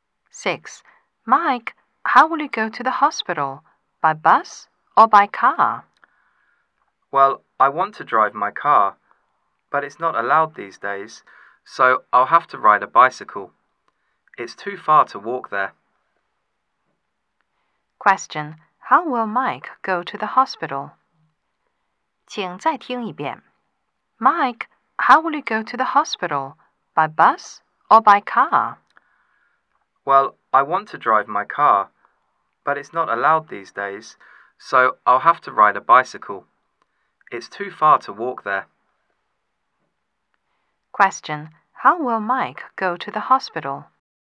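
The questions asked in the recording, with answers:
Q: How will Mike go to the hospital?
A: By bicycle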